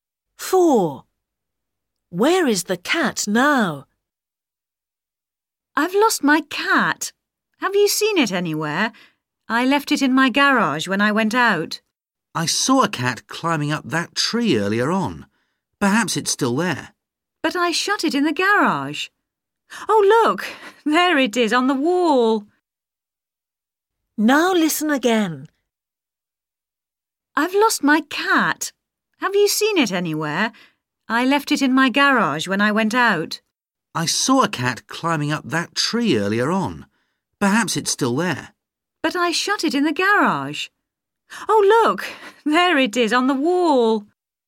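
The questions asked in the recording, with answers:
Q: Where is the cat now?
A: On the wall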